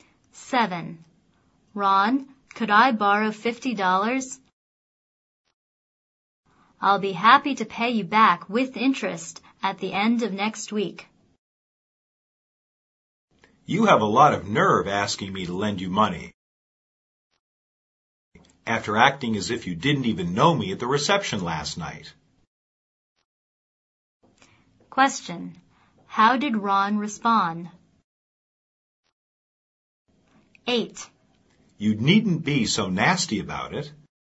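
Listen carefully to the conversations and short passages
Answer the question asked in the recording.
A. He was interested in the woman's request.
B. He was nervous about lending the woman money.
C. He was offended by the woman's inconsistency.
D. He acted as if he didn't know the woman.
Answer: C. He was offended by the woman's inconsistency.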